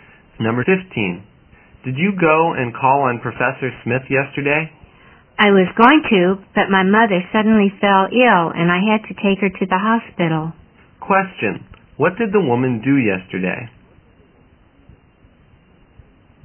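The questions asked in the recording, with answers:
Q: what did the woman do yesterday?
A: She took her sick mother to the hospital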